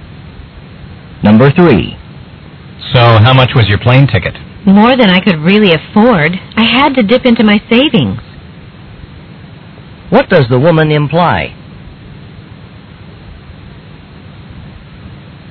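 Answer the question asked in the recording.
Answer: Her plane ticket was very expensive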